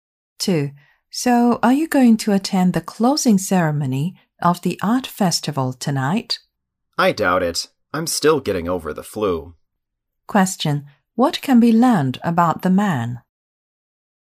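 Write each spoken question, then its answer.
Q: What can be learned about the man?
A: He probably won't attend the closing ceremony because he is still getting over the flu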